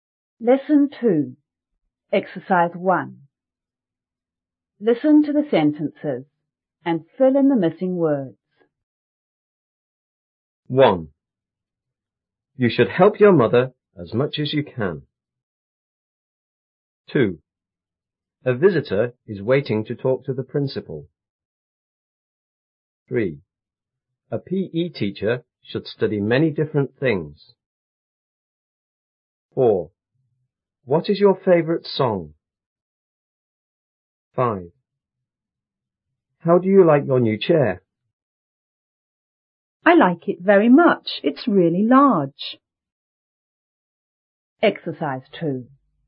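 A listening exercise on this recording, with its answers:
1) You _ help your mother _ _ _ you can.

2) A _ is waiting to talk to the principal.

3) A P.E teacher should study _ _ things.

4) What is your _ _?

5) B:I like it very much.It's really _.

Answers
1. should; as much as
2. visitor
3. many different
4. favorite song
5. large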